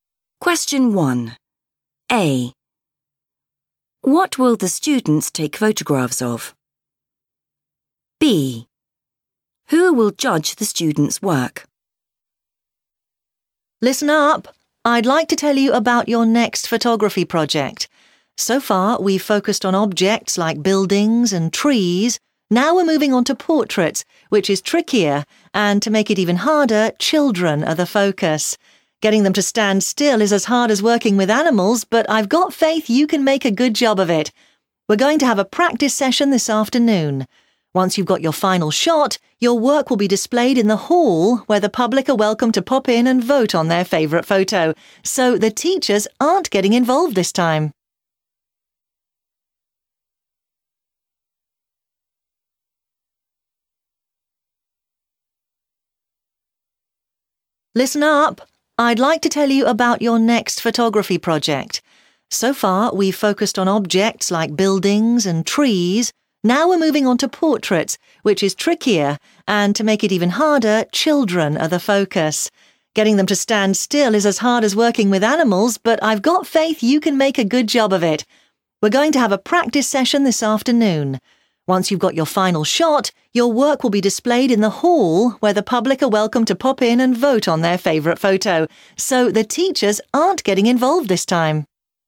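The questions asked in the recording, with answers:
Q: What will the students take photographs of?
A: children

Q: Who will judge the students' work?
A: the public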